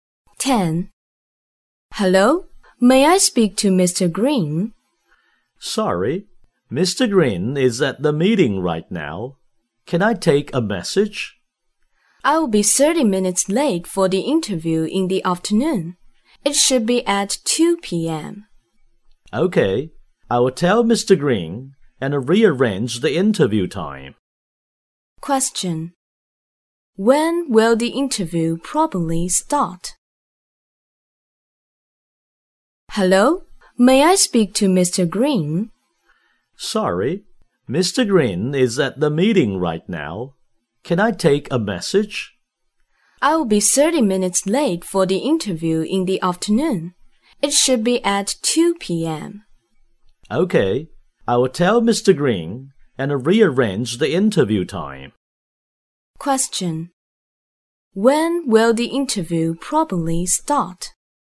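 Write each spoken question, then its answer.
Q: When will the interview probably start?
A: At 2:30 p.m.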